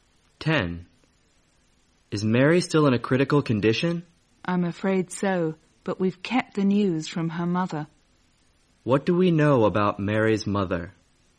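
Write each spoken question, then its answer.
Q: What do we know about Mary's mother?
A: She doesn't know Mary is in a critical condition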